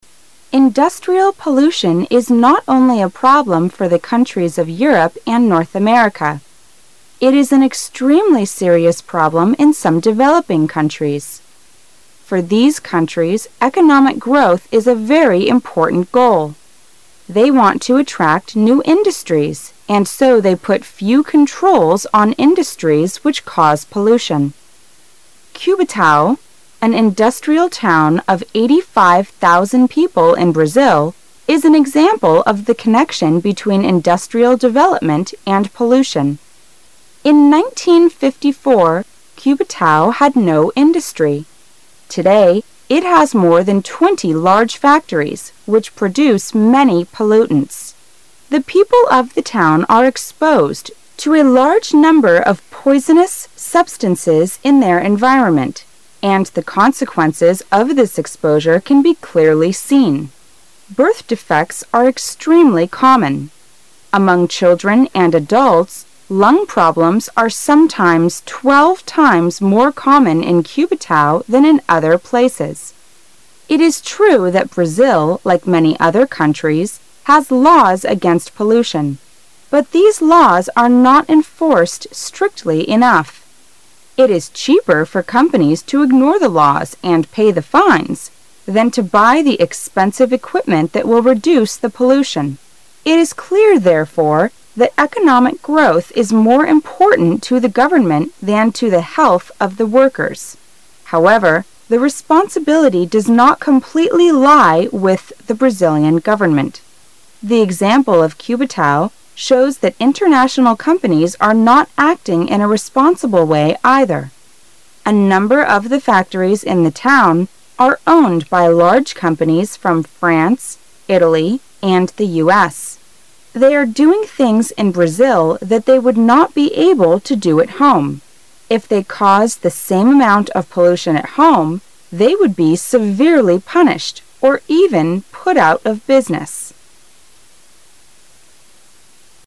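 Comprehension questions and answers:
For Questions 6 - 10 ,you will hear a talk about industrial pollution. While you listen ,complete the sentences and answer the questions. Use not more than 3 words for each answer.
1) What is an important goal for some developing countries?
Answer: economic growth

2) How many people are there in the town Cubatao?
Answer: 85,000

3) In Cubatao today, there are more than twenty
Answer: large factories

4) How many times are lung problems more common in Cubatao than in other places?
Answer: 12 times

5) The laws against pollution in Brazil are not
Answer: enforced strictly enough

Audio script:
Economic growth
[解析] 6-10 Industrial pollution is not only a problem for the countries of Europe and North America. It is an extremely serious problem in some developing countries. For these countries, economic growth is a very important goal. They want to attract new industries, and so they put few controls on industries which cause pollution. 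Cubatao, an industrial town of 85,000 people in Brazil, is an example of the connection between industrial development and pollution. In 1954, Cubatao had no industry. Today it has more than twenty large factories, which produce many pollutants. The people of the town are exposed to a large number of poisonous substances in their environment, and the consequences of this exposure can be clearly seen. Birth defects are extremely common. Among children and adults, lung problems are sometime twelve times more common in Cubatao than in other places. It is true that Brazil, like many other countries, has laws against pollution, but these laws are not enforced strictly enough. It is cheaper for companies to ignore the laws and pay the fines than to buy the expensive equipment that will reduce the pollution. It is clear, therefore, that economic growth is more important to the government than to the health of the workers. 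However, the responsibility does not completely lie with the Brazilian government. The example of Cubatao shows that international companies are not acting in a responsible way, either. A number of the factories in the town are owned by large companies from France, Italy, and the U. S.. They are doing things in Brazil that they would not be able to do at home. If they cause the same amount of pollution at home, they would be severely punished or even put out of business.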